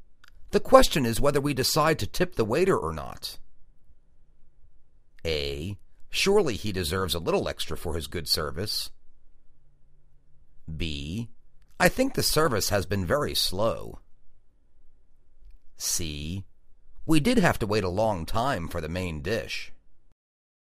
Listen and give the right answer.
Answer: Surely he deserves a little extra for his good service.